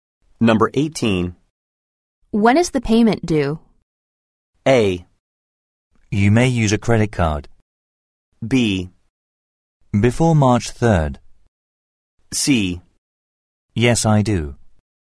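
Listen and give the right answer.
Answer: B: Before March 3rd.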